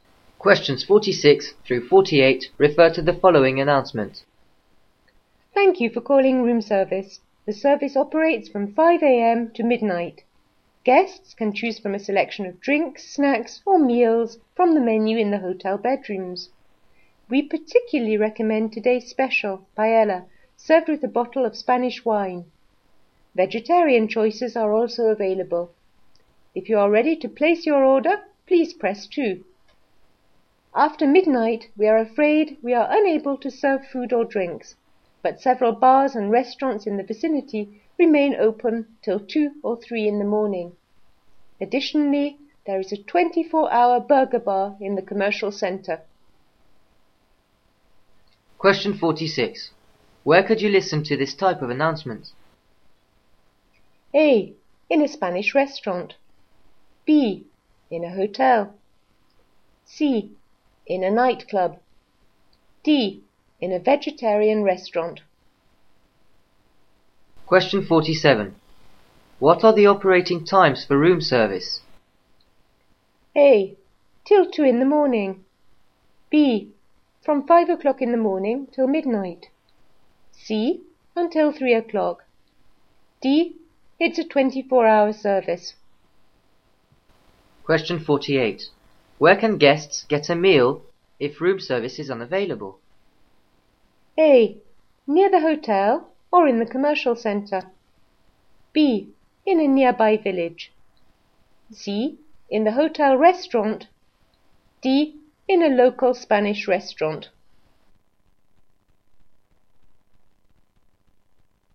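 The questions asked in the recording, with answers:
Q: Where could you listen to this type of announcement?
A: B: In a hotel.

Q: What are the operating times for room service?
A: B: From 5 o'clock in the morning till midnight.

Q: Where can guests get a meal if room service is unavailable?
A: A: Near the hotel or in the commercial centre.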